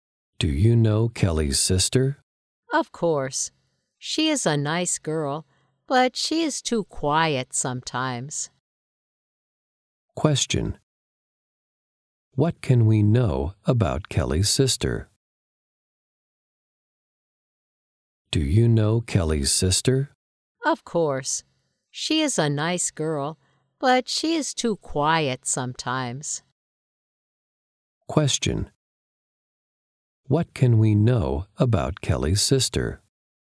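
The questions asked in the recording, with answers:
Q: What can we know about Kelly's sister?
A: She is nice but sometimes too quiet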